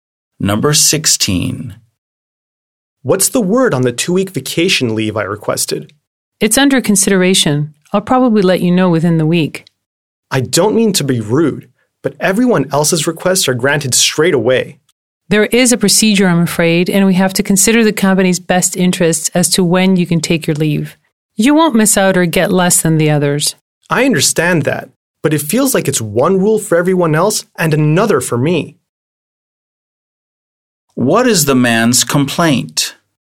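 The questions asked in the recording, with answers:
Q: What is the man's complaint?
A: His leave request is treated differently from everyone else's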